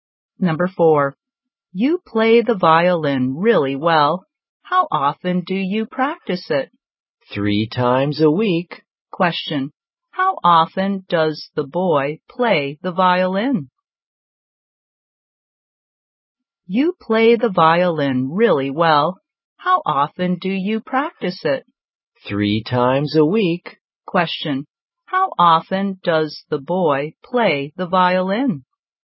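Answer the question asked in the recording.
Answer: 3 times a week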